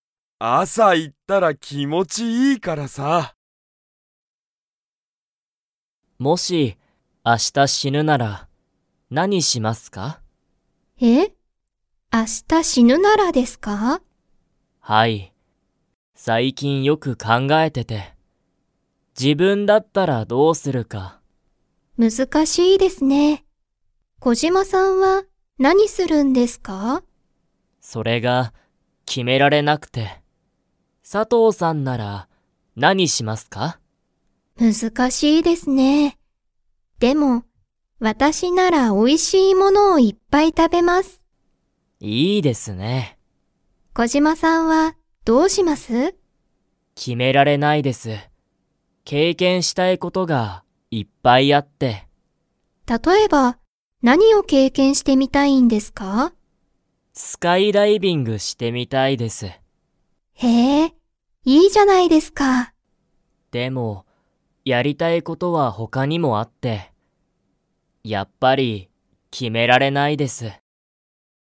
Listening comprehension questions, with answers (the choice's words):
Comprehension Quiz (Skip if you don't understand the conversation yet)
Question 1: 佐藤さとうさんは、スカイダイビングをしてみたいですか?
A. はい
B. いいえ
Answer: いいえ

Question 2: 小島こじまさんは、____がいっぱいある。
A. 美味おいしい物もの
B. 考かんがえること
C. 決きめたい物もの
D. 経験けいけんしたいこと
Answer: 経験けいけんしたいこと

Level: Level 2